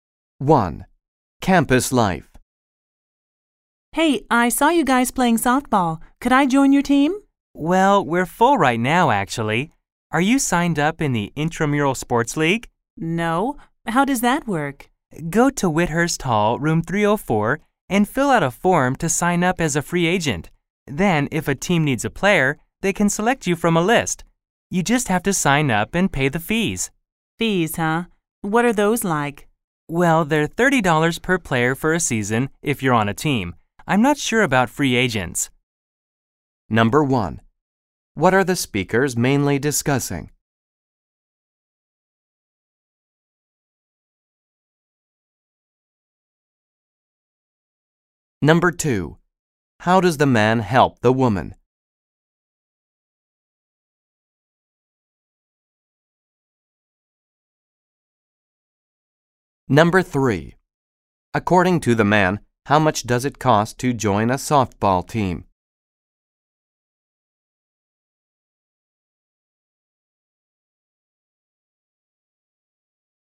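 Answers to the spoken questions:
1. How to join an intramural softball team
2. He tells her how to sign up as a free agent
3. $30 per player for a season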